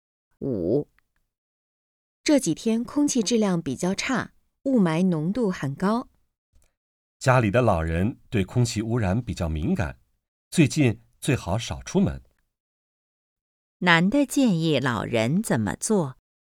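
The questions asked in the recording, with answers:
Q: 男的建议老人怎么做?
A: 最近少出门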